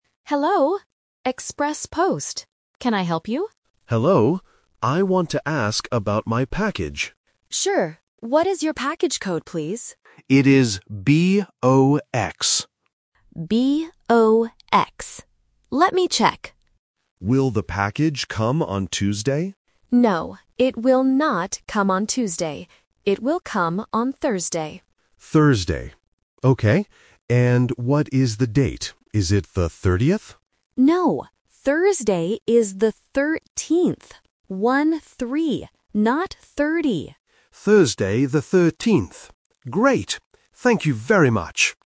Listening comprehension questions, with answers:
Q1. What is the customer's package code?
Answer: B-O-X

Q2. What day will the package come?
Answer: Thursday

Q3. What is the date on Thursday?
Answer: The 13th